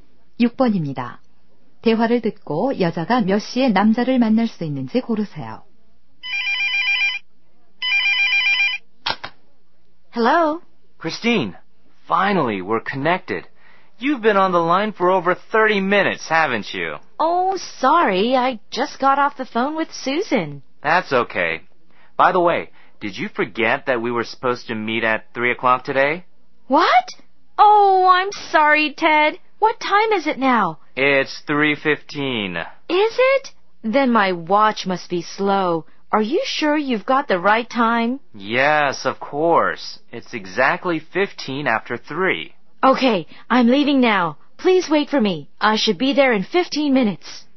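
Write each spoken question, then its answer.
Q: 대화를 듣고 여자가 몇 시에 남자를 만날 수 있는지 고르세요.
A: 3시 30분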